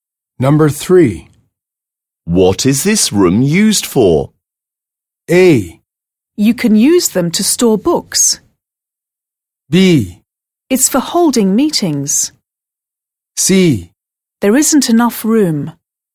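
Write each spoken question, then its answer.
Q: What is this room used for?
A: B: It's for holding meetings.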